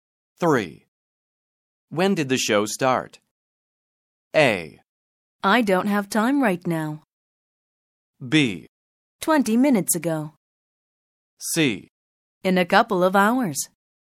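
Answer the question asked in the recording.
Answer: B: 20 minutes ago.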